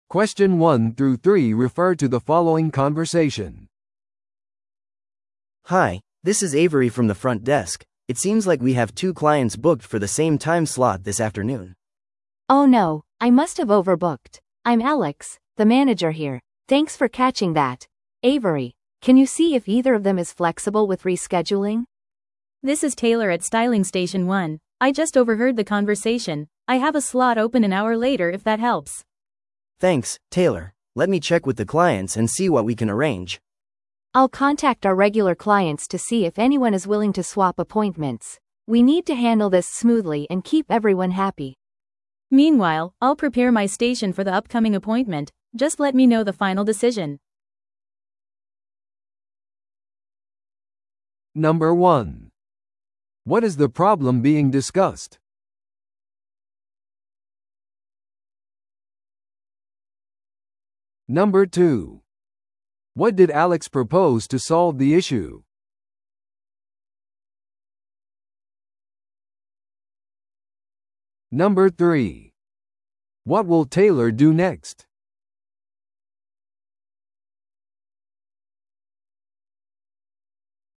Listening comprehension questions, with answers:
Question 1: What is the problem being discussed?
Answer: 2つの予約が同じ時間に入っている。

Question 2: What did Alex propose to solve the issue?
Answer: 可能性のある交換のために常連客に連絡する。

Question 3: What will Taylor do next?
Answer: 次のクライアントのためにスタイリングステーションを準備する。

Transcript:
A: Hi, this is Avery from the front desk. It seems like we have two clients booked for the same time slot this afternoon.
B: Oh no, I must have overbooked. I'm Alex, the manager here. Thanks for catching that, Avery. Can you see if either of them is flexible with rescheduling?
C: This is Taylor at styling station one. I just overheard the conversation. I have a slot open an hour later if that helps.
A: Thanks, Taylor. Let me check with the clients and see what we can arrange.
B: I'll contact our regular clients to see if anyone is willing to swap appointments. We need to handle this smoothly and keep everyone happy.
C: Meanwhile, I'll prepare my station for the upcoming appointment. Just let me know the final decision.